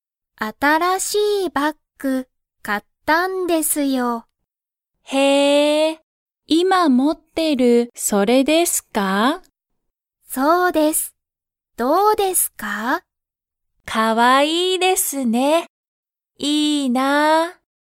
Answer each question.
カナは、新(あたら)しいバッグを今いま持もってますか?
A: はい

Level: Level 1